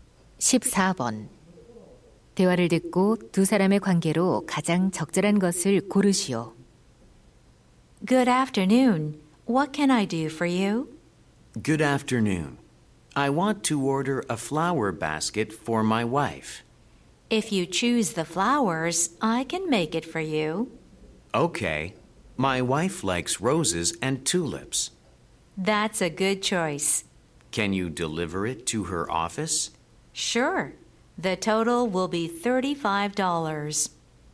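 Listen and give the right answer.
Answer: 꽃집 주인 - 손님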